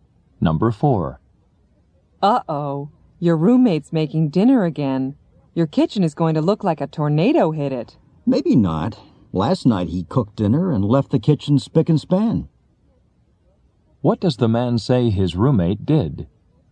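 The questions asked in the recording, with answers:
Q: What does the man say his roommate did?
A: He left the kitchen very clean last night.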